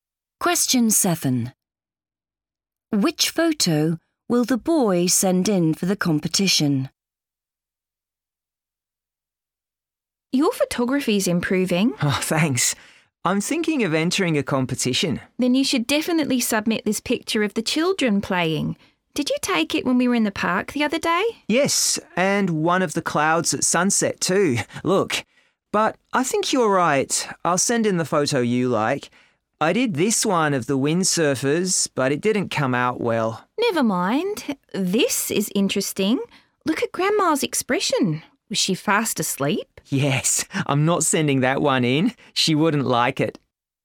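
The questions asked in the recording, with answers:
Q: Which photo will the boy send in for the competition?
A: The picture of the children playing in the park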